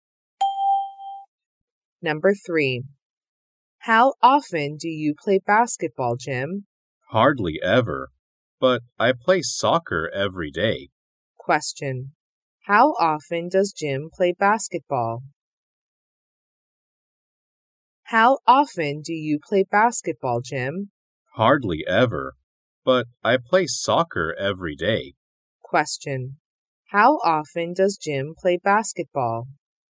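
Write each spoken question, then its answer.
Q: How often does Jim play basketball?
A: Hardly ever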